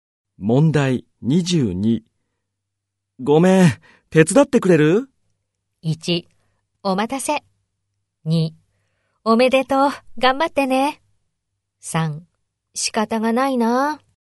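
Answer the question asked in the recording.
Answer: 3: 仕方がないな。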